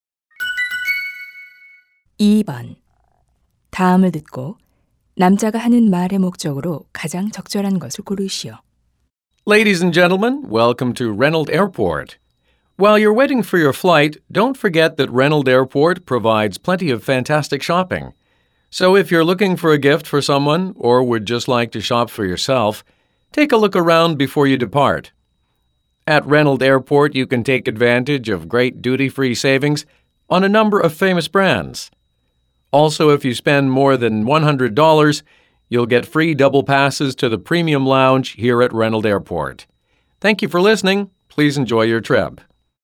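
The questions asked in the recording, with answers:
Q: 다음을 듣고 남자가 하는 말의 목적으로 가장 적절한 것을 고르시오.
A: 공항 면세점 쇼핑을 홍보하려고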